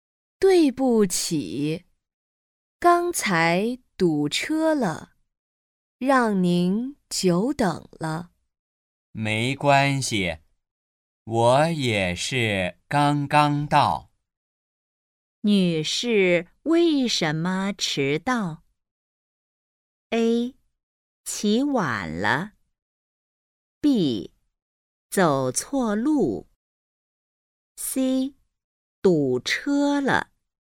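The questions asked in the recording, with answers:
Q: 女士为什么迟到?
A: C: 堵车了。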